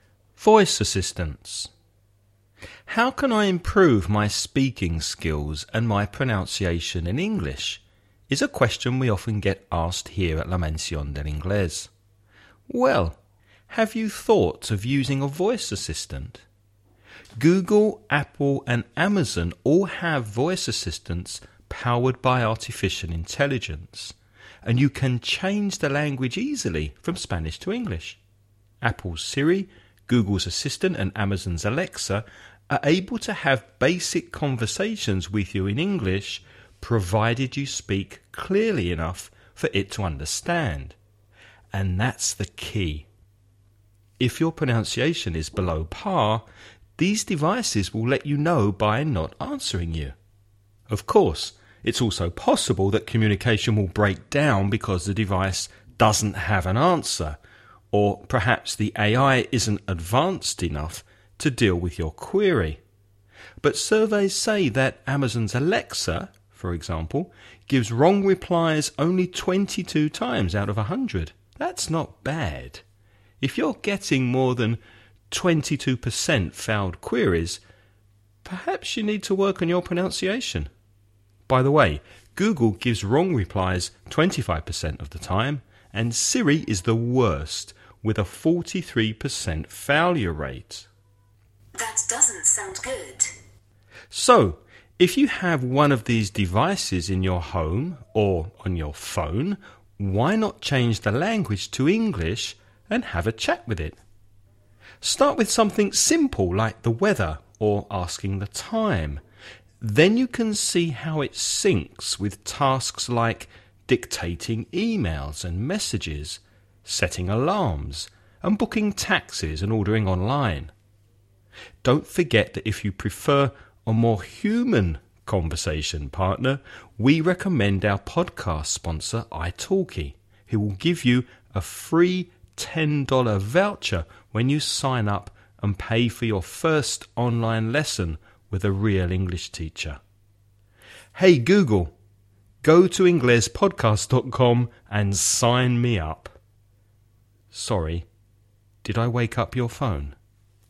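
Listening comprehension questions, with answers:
Before you listen about a man talking about improving your English with voice assistants, read the following questions.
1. Which three companies that have voice assistants does the man mention?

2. What does the man say it's important for you to have in order to be understood by a voice assistant?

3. How often does Alexa give inaccurate answers to voice queries?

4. What's the percentage of wrong answers that Siri gives?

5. Which two simple questions does the man suggest you begin with?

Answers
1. Google, Apple and Amazon
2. Good pronunciation (speaking clearly enough)
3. 22 times out of 100
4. 43%
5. The weather and asking the time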